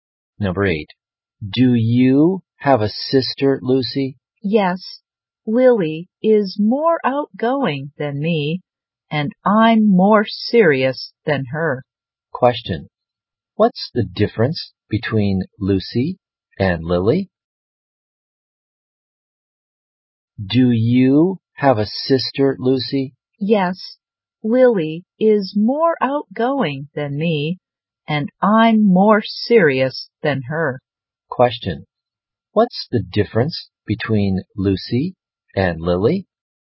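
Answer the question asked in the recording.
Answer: Lily is more outgoing and Lucy is more serious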